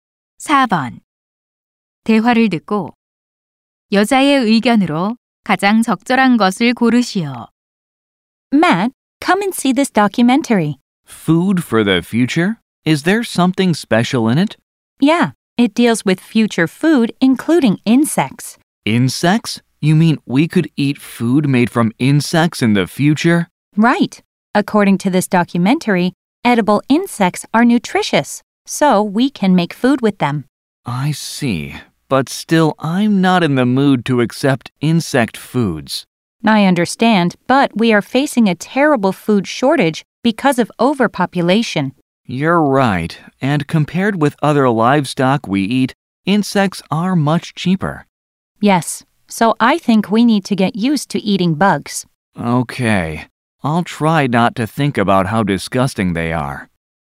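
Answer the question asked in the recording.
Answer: 식량 부족에 대비해 곤충을 먹는 데 익숙해져야 한다.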